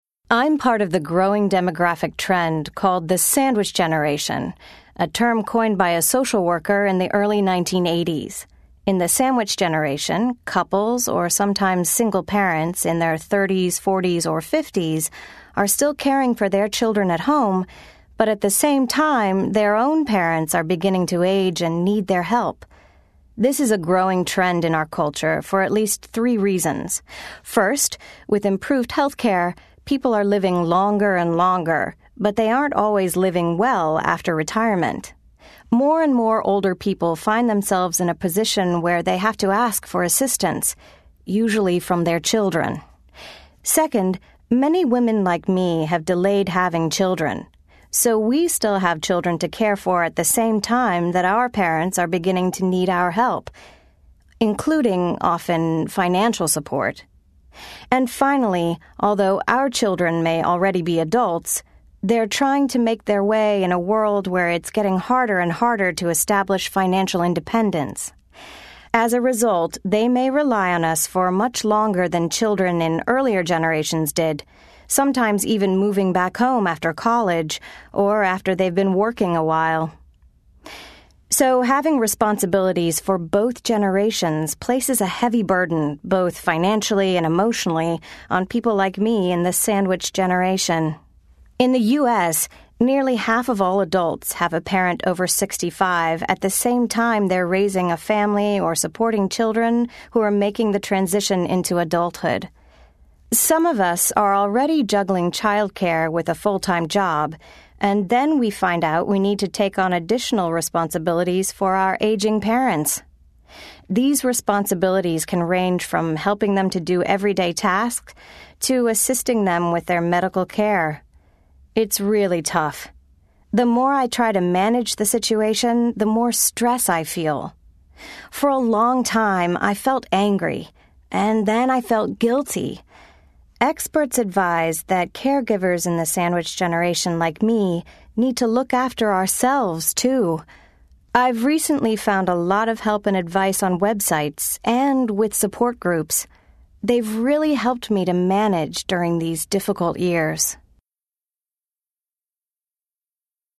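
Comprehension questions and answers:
Listen to the presentation. Choose all the correct answers.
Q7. According to the speaker, which of the following are factors for the sandwich generation?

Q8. According to the speaker, in what ways are older children of the sandwich generation different from children in the previous generation?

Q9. According to the speaker, what are some factors that make being a member of the sandwich generation particularly stressful?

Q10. Where does the speaker suggest other members of the sandwich generation can find help?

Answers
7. People live longer, women delay having children, and adult children find it harder to become financially independent.
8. They rely on their parents longer and sometimes move back home after college or work.
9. Financial and emotional burdens, juggling childcare with a full-time job, and helping aging parents with daily tasks and medical care.
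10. On websites and in support groups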